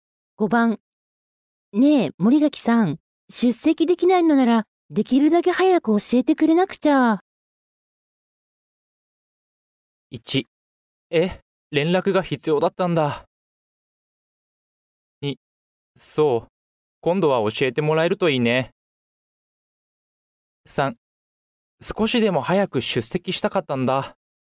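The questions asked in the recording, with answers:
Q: ねえ、森垣さん。出席できないのなら、できるだけ早く教えてくれなくちゃ。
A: 1: え、連絡が必要だったんだ。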